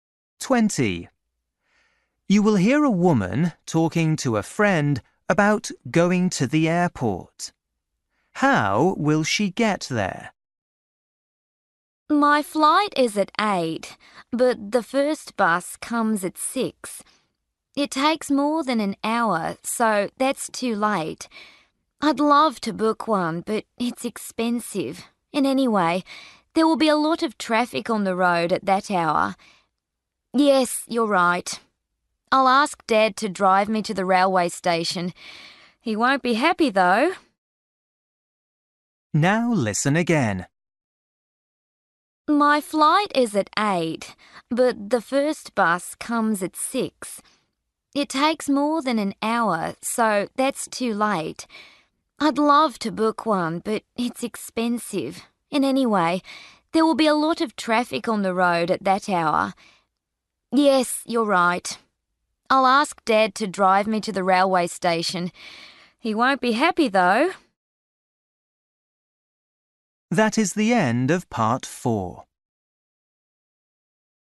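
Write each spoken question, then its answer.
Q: How will she get there?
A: by train (Dad drives her to the railway station)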